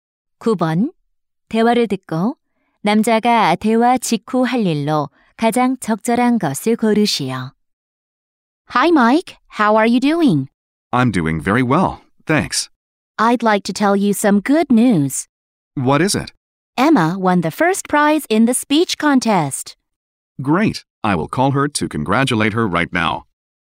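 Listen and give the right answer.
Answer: Emma에게 축하 전화하기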